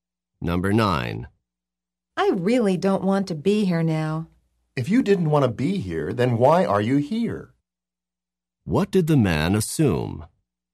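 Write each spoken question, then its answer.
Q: What did the man assume?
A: That the woman wanted to be there.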